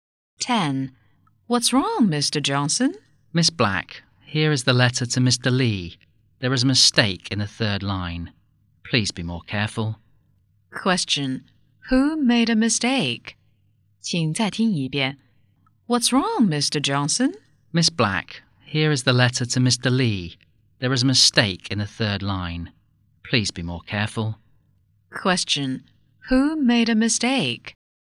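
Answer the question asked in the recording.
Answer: Miss Black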